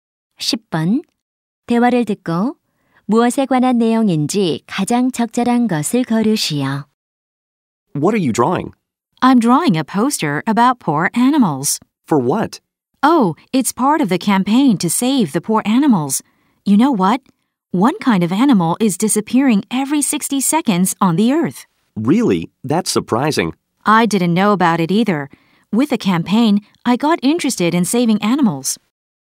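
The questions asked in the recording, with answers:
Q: 대화를 듣고 무엇에 관한 내용인지 가장 적절한 것을 고르시오.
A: 멸종 위기 동물 보호 캠페인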